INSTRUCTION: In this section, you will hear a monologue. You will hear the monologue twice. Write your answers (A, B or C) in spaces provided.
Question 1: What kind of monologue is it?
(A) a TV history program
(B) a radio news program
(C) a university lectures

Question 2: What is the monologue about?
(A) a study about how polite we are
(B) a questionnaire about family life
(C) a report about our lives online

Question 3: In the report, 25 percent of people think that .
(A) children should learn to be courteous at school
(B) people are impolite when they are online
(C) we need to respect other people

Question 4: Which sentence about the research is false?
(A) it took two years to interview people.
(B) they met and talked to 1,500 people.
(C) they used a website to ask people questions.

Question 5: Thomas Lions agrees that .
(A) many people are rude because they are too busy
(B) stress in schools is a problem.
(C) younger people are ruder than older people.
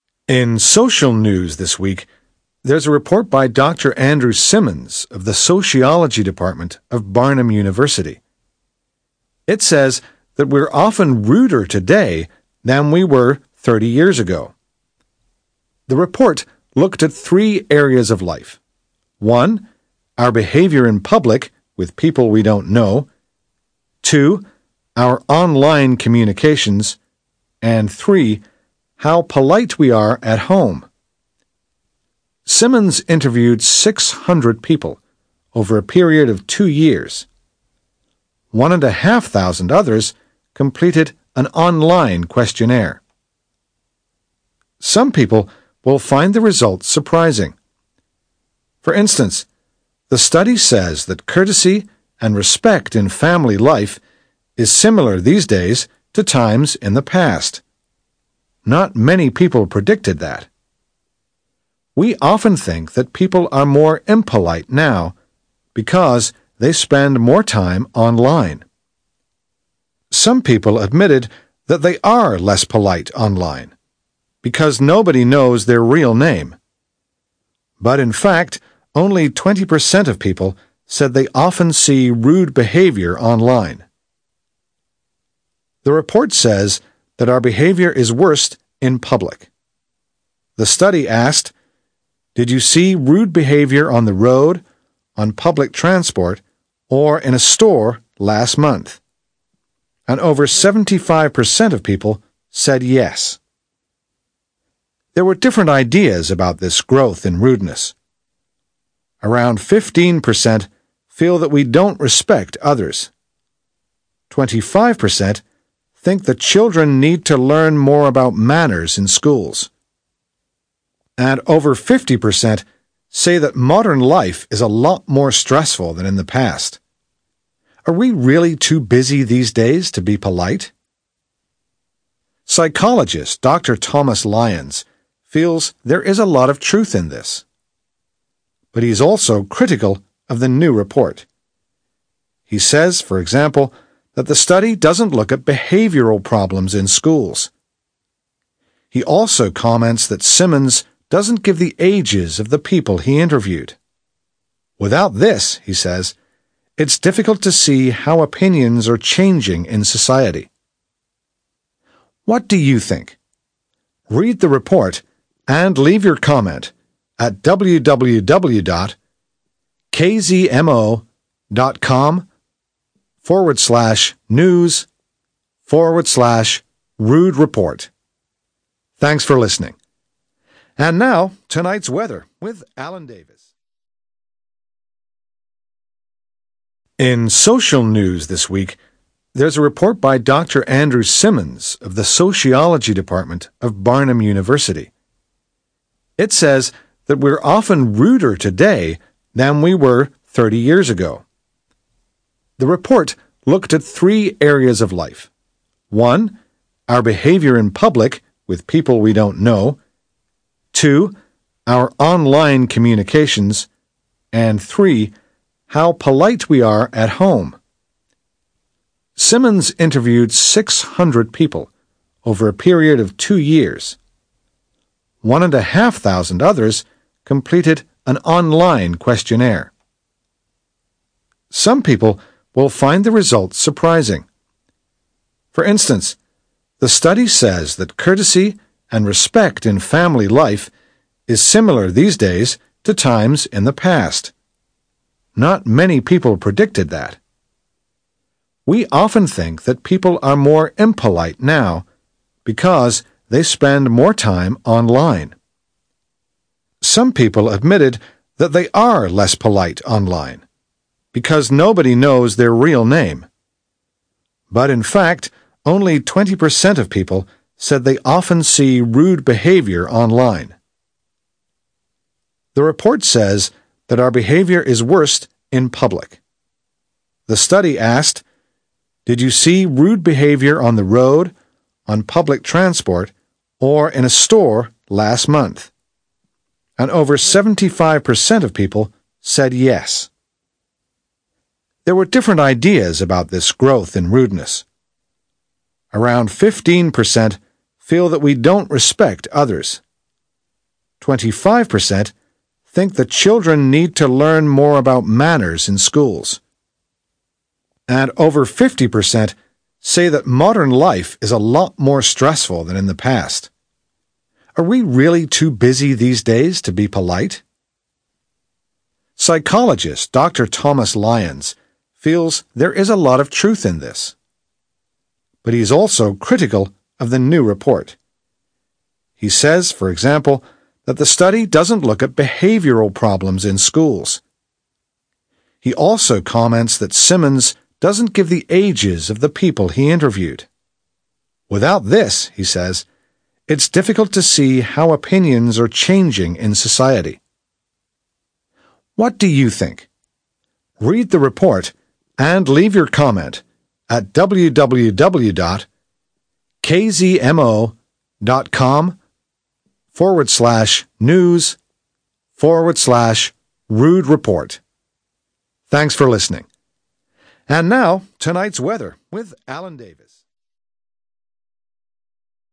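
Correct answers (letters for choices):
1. B
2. A
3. A
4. B
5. A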